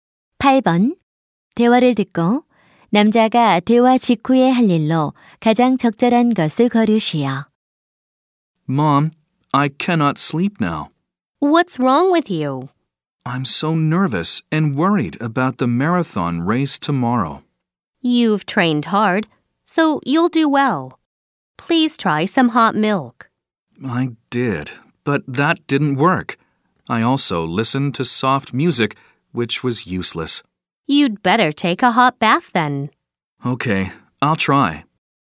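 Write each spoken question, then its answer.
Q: 대화를 듣고 남자가 대화 직후에 할 일로 가장 적절한 것을 거르시오.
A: 뜨거운 목욕하기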